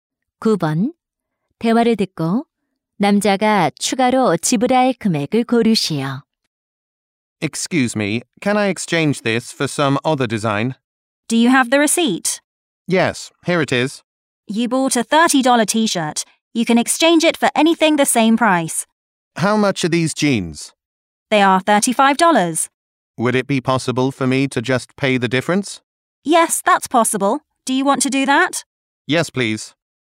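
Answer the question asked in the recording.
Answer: 5달러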